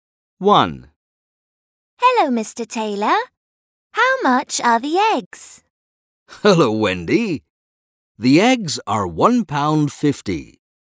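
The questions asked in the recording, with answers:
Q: How much are the eggs?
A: £1.50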